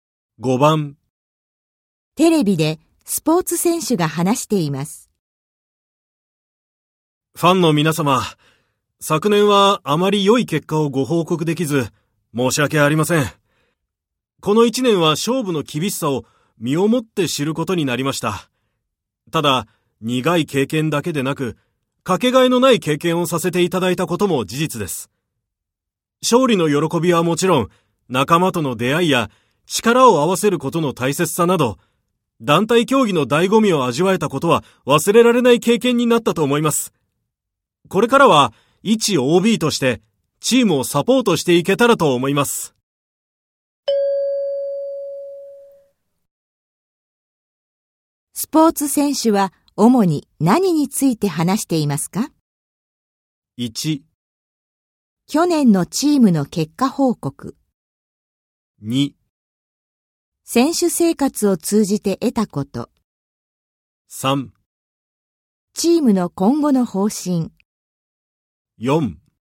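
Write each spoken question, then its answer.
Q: スポーツ選手は主に何について話していますか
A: 2: 選手生活を通じて得たこと。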